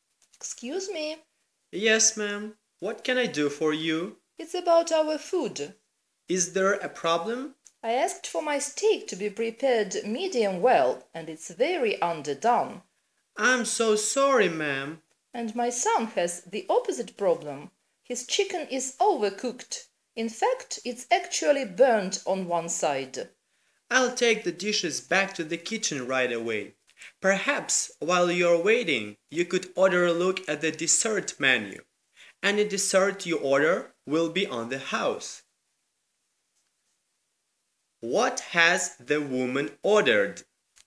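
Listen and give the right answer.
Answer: A steak, medium well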